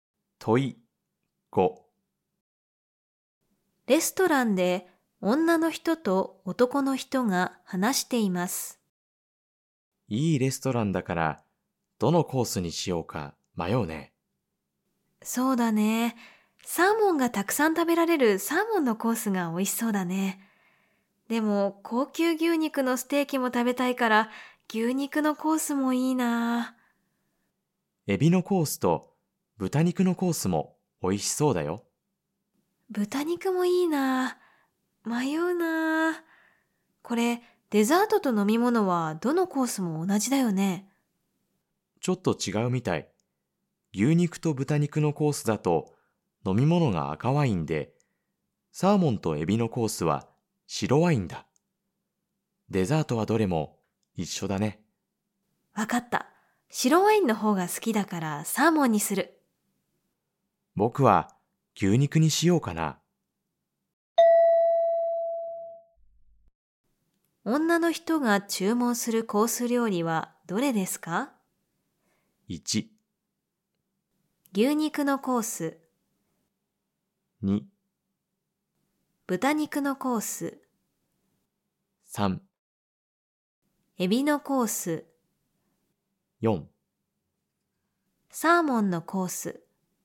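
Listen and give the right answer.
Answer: 4: サーモンのコース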